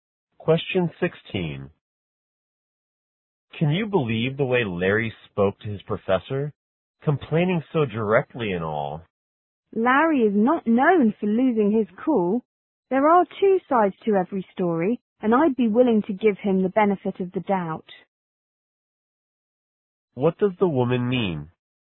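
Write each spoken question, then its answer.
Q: What does the woman mean?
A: Larry probably had a good reason for what he did.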